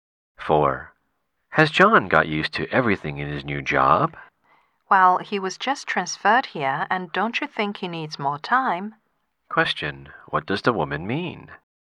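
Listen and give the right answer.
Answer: John needs more time to get used to his new job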